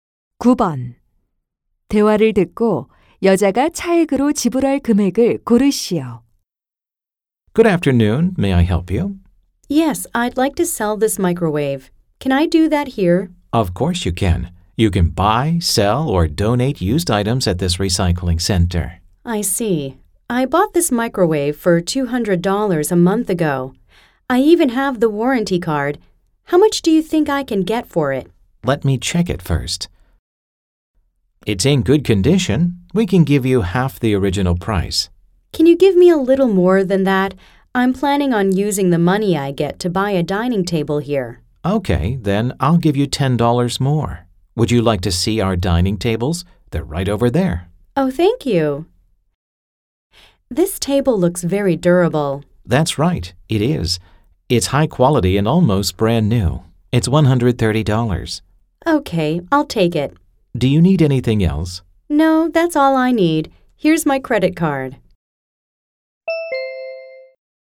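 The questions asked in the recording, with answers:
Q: 대화를 듣고 여자가 차액으로 지불할 금액을 고르시오.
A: $20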